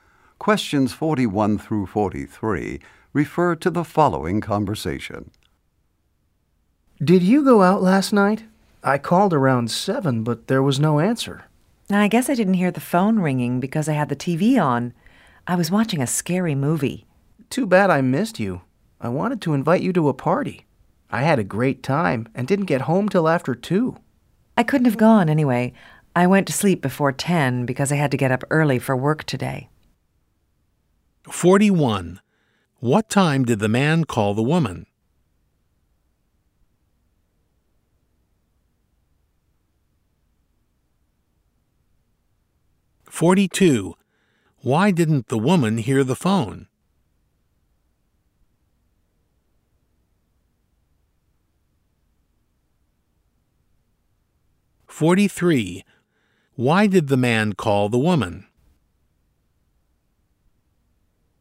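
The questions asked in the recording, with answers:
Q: What time did the man call the woman?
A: Around 7

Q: Why didn't the woman hear the phone?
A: She had the TV on

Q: Why did the man call the woman?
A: To invite her to a party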